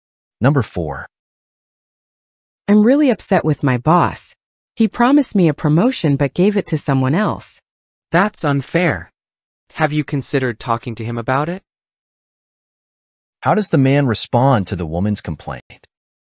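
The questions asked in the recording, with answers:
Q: How does the man respond to the woman's complaint?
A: He suggests she talk to her boss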